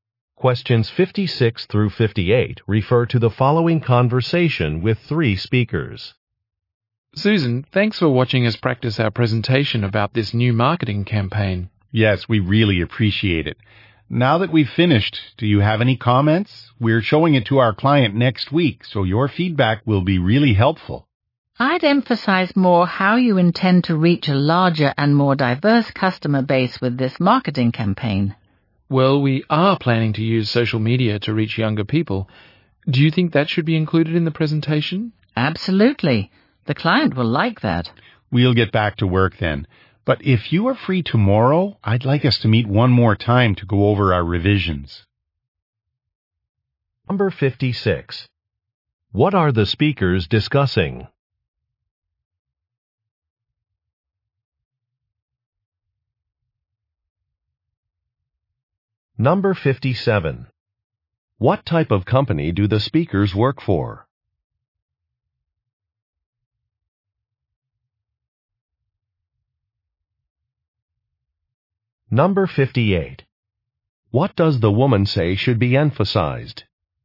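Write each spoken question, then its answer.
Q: What are the speakers discussing?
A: A presentation about a marketing campaign

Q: What does the woman say should be emphasized?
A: Reaching a larger, more diverse customer base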